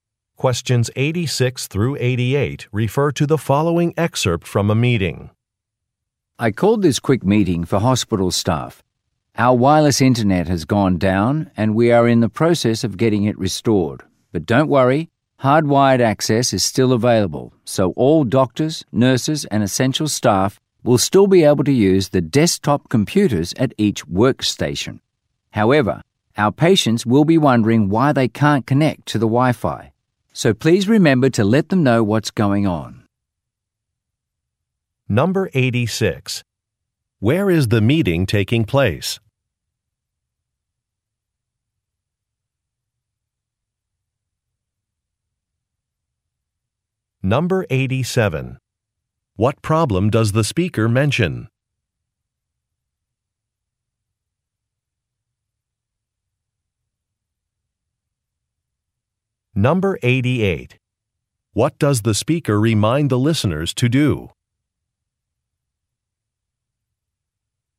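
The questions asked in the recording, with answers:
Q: Where is the meeting taking place?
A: At a hospital

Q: What problem does the speaker mention?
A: The wireless internet is down

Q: What does the speaker remind the listeners to do?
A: Tell patients about the Wi-Fi problem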